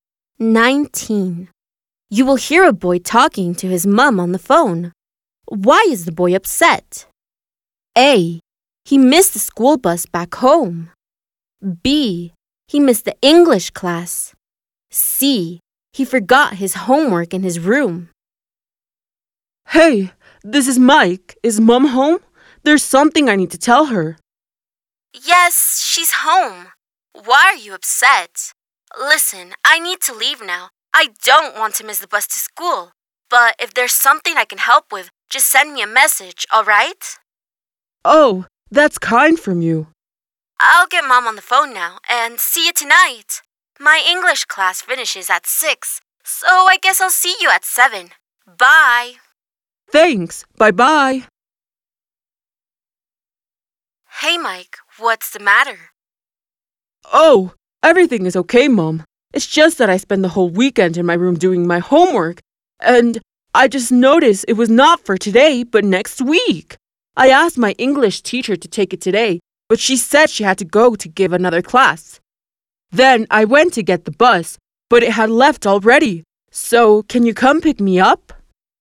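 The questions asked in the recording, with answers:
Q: Why is the boy upset? A. He missed the school bus back home.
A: A: He missed the school bus back home.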